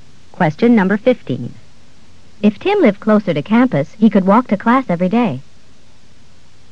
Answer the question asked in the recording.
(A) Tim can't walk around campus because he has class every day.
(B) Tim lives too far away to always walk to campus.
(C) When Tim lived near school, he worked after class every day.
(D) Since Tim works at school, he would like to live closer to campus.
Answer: (B) Tim lives too far away to always walk to campus.

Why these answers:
If Tim lived closer to campus, he could walk to class every day.

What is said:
15. If Tim lived closer to campus, he could walk to class every day.